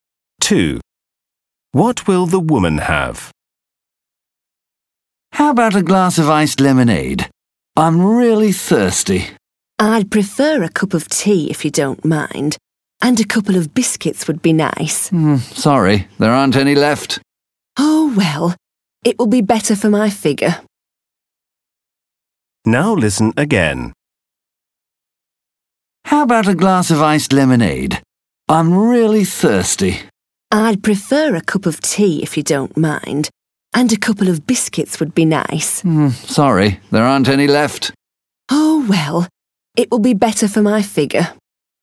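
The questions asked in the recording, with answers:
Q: What will the woman have?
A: a cup of tea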